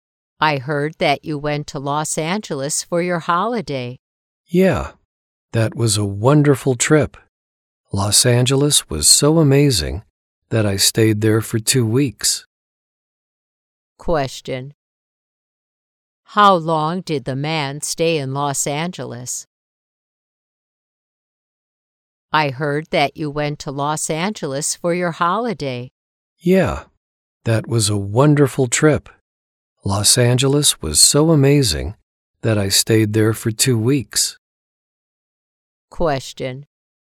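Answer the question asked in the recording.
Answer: 2 weeks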